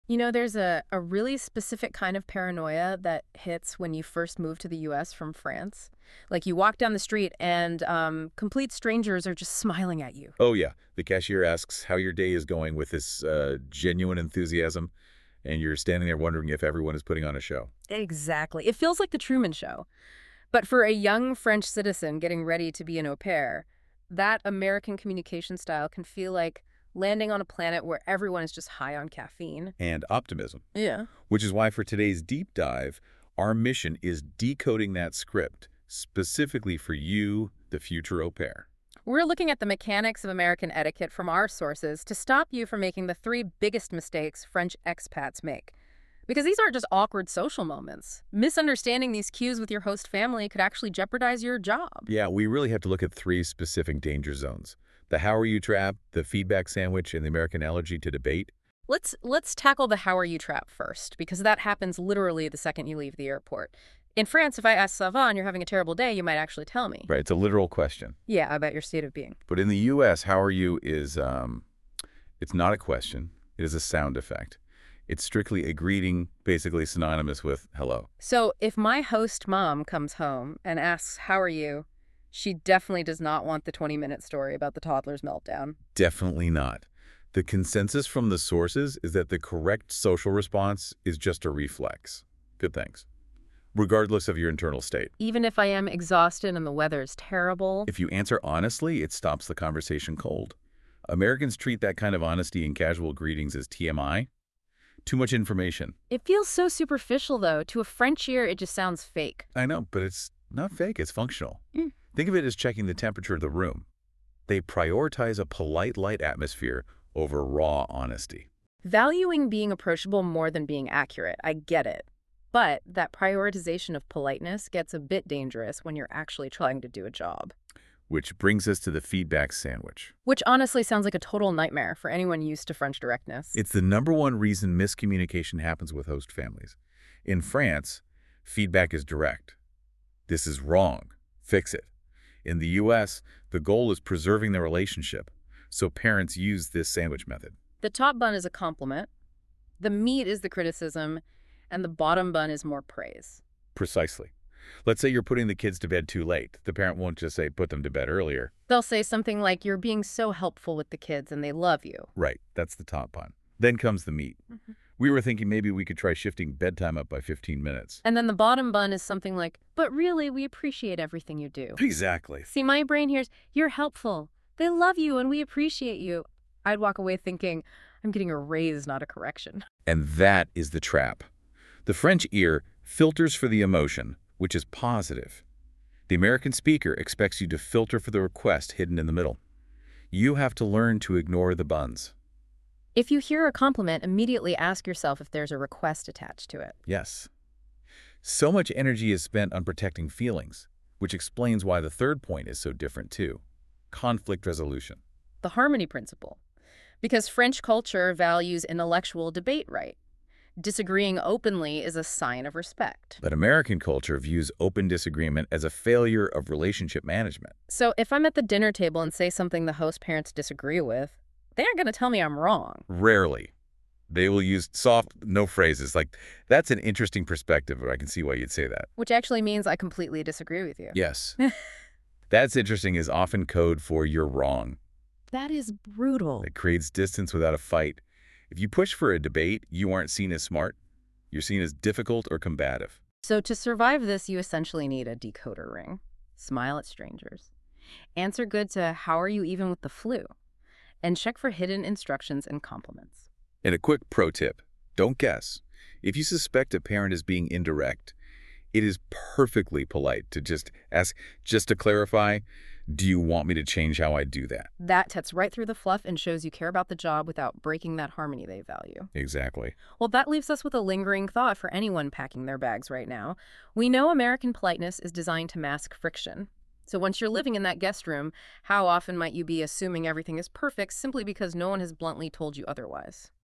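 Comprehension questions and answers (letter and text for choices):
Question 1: In the U.S., "How are you?" is usually...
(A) A serious question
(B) A greeting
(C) A complaint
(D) A personal discussion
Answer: (B) A greeting

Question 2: What is the typical response to "How are you?"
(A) "Good, thanks! How are you?"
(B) Silence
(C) A long explanation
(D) A personal story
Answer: (A) "Good, thanks! How are you?"

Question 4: How might small talk feel to French people?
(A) Exciting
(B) Deep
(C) Superficial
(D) Necessary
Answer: (C) Superficial

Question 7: What is the "sandwich method"?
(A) A cooking technique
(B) A way to greet someone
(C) A method of giving feedback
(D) A type of small talk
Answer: (C) A method of giving feedback

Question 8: What comes first in the sandwich method?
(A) Criticism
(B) A question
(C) Something positive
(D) Silence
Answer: (C) Something positive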